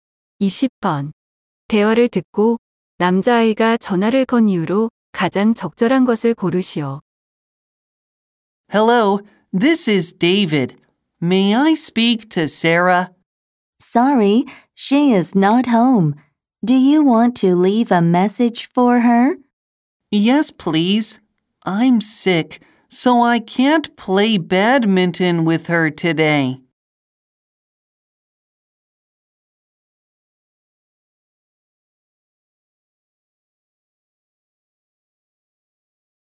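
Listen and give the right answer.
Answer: 아파서 오늘 배드민턴을 칠 수 없다고 전하려고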